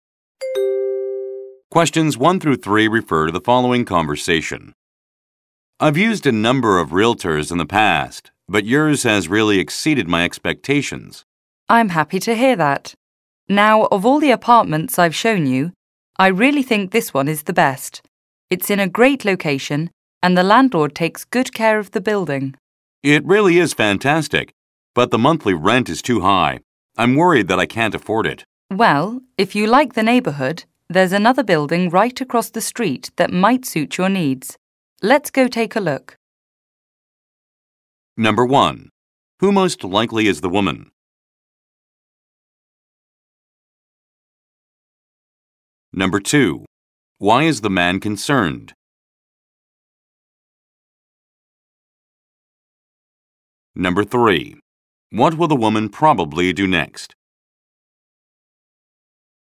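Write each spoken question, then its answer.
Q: Who most likely is the woman?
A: A realtor

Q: Why is the man concerned?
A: The monthly rent is too high

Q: What will the woman probably do next?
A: Show him another building across the street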